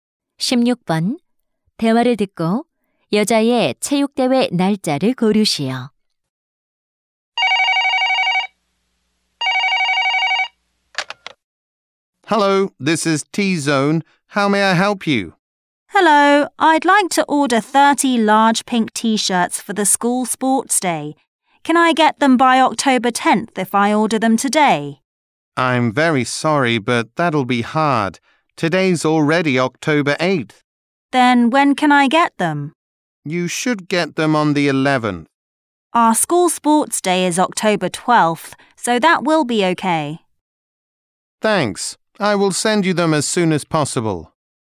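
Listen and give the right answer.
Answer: 10월 12일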